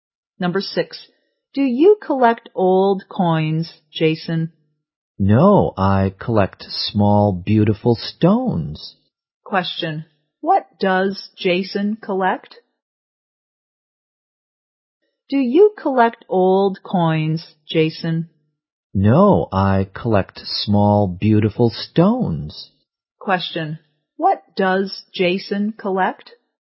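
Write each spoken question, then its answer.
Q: what does Jason collect?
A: Small, beautiful stones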